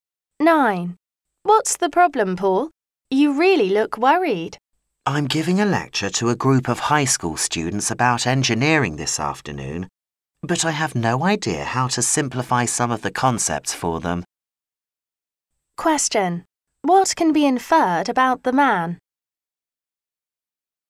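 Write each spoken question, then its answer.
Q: What can be inferred about the man?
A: He doesn't know how to explain engineering concepts simply to students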